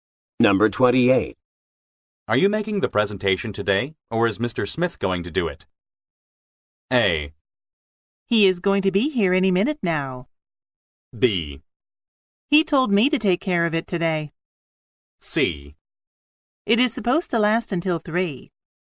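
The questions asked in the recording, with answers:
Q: Are you making the presentation today, or is Mr. Smith going to do it?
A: B: He told me to take care of it today.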